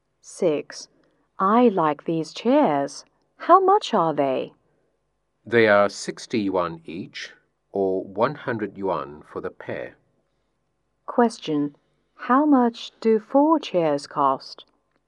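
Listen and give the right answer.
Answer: 200 yuan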